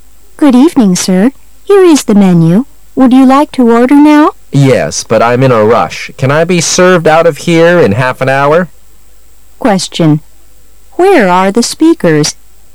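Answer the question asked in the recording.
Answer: In a restaurant

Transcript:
[解析] W: Good evening, sir. Here is the menu. Would you like to order now? M: Yes, but I'm in a rush. Can I be served out of here in half an hour? Q: Where are the speakers?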